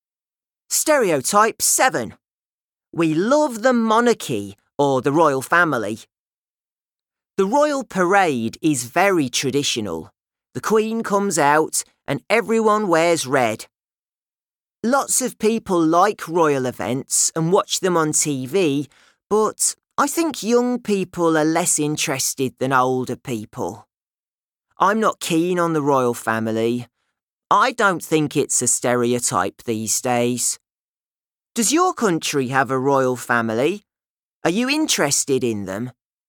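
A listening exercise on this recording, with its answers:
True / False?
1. When the traditional royal parade takes place, all the members of the royal family wear purple.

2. Older people are more interested in the royal events than young people.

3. Josh is not really interested in the royal family.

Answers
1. False
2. True
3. True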